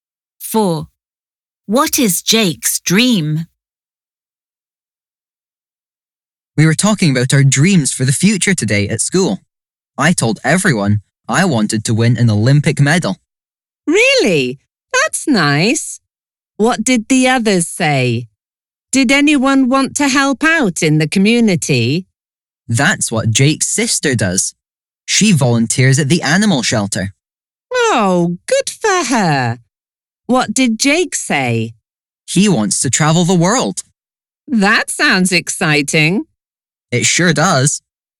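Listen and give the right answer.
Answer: To travel the world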